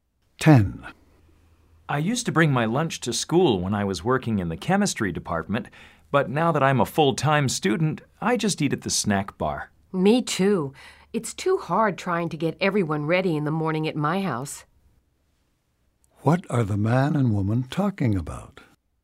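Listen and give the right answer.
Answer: Eating lunch at the snack bar instead of bringing lunch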